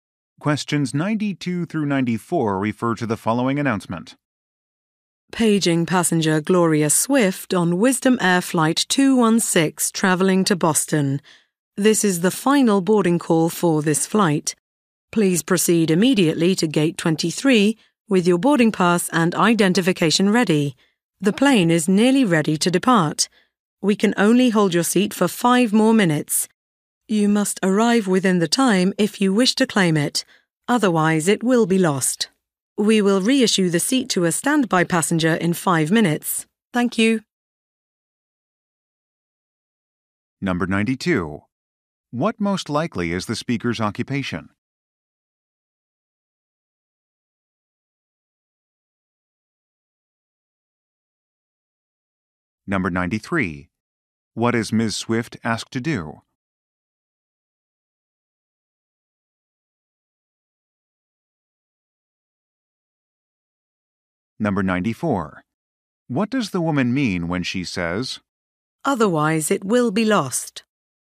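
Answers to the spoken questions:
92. Airline gate agent
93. Go to Gate 23 immediately
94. Her seat will be given to a standby passenger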